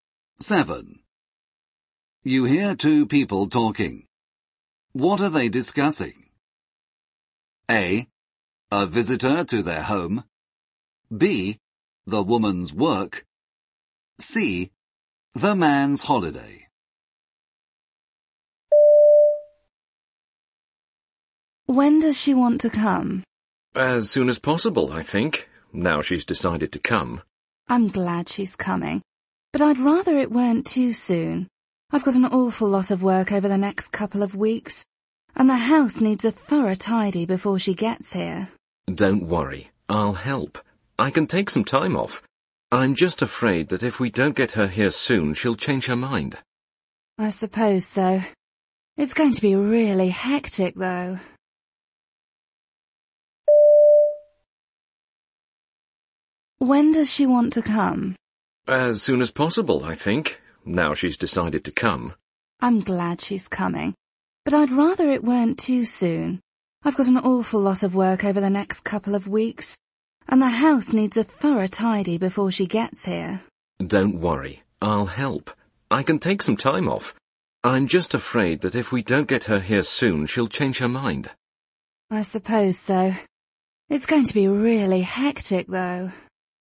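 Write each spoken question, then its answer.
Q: What are they discussing?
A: A: A visitor to their home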